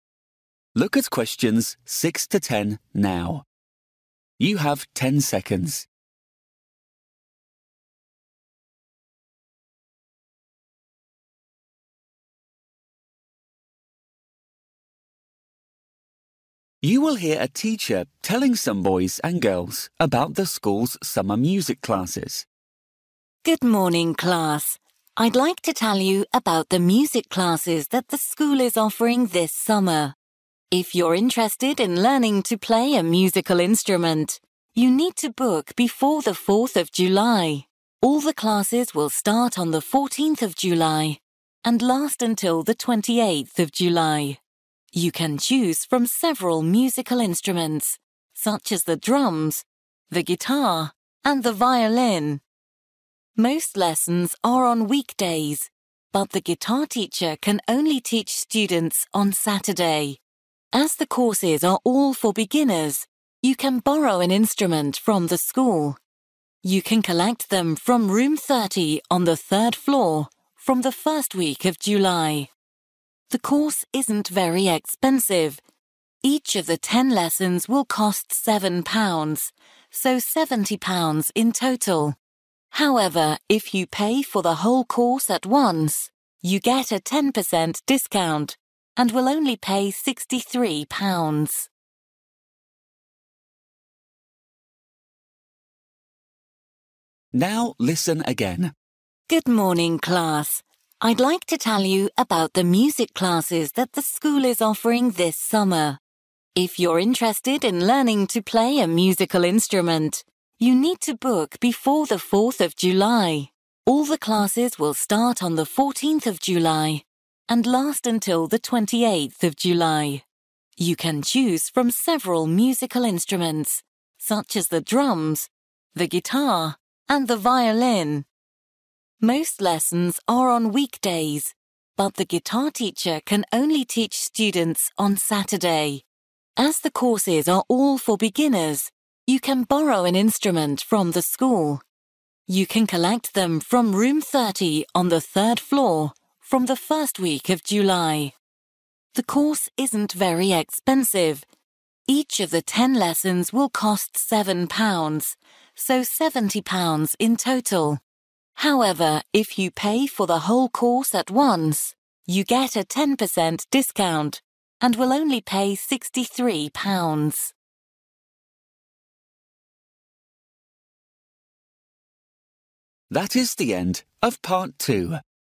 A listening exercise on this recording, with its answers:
For each question, write the correct answer in the gap. Write one word or a number or a date or a time.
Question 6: ........................ July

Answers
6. 14th

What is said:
Good morning class. I'd like to tell you about the music classes that the school is offering this summer. If you're interested in learning to play a musical instrument, you need to book before the 4th July. All the classes will start on the 14th of July and last until the 28th July.
You can choose from several musical instruments such as the drums, the guitar and the violin. Most lessons are on weekdays but the guitar teacher can only teach students on Saturday.
As the courses are all for beginners, you can borrow an instrument from the school. You can collect them from Room 30 on the third floor from the first week of July.
The course isn't very expensive: each of the ten lessons will cost £7, so £70 in total. However, if you pay for the whole course at once, you get a 10% discount and will only pay 63 pounds.

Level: KET (A2)